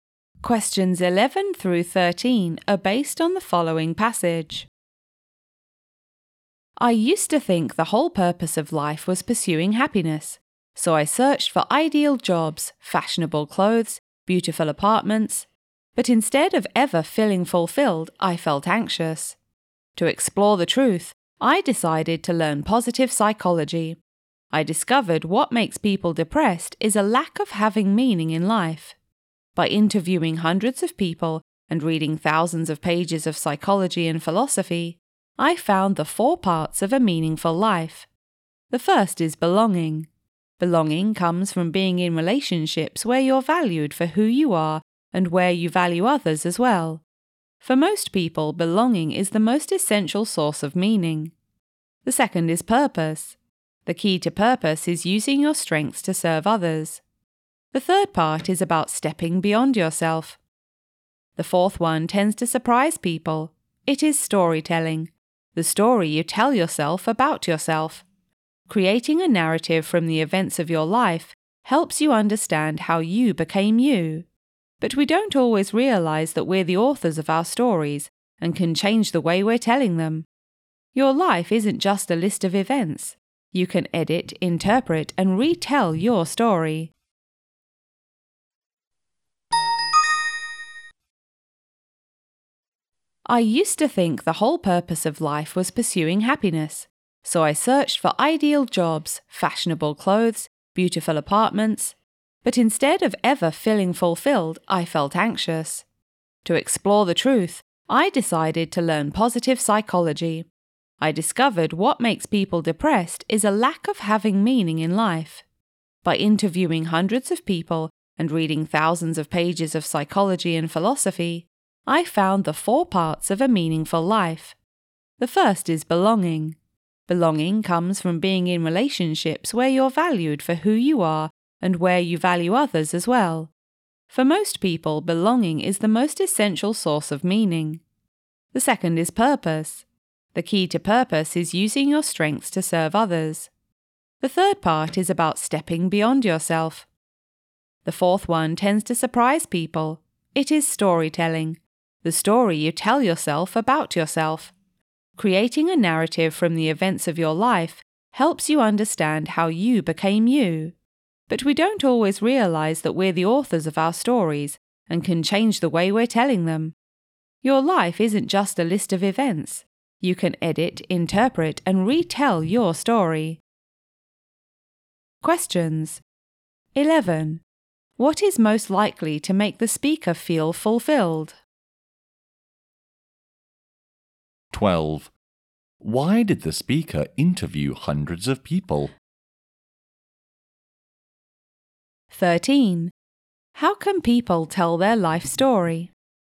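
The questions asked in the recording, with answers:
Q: Why did the speaker interview hundreds of people?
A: To find the parts of a meaningful life

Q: How can people tell their life story?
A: By editing, interpreting and retelling it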